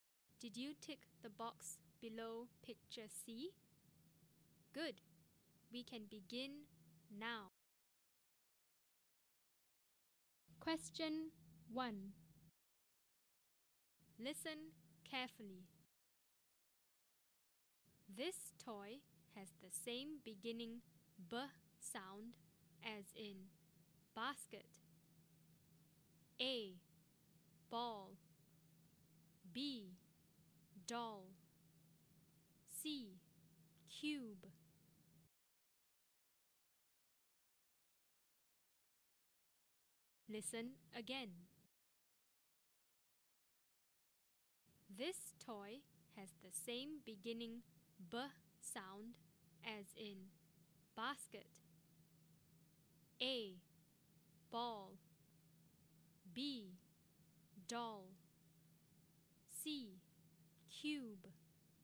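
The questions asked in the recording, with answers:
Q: This toy has the same beginning B sound as in basket.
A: A: Ball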